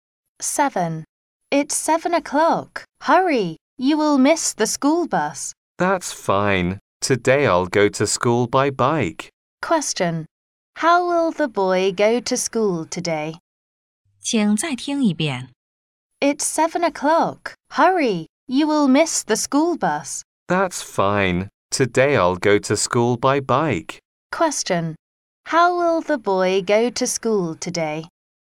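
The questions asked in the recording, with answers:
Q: How will the boy go to school today?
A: By bike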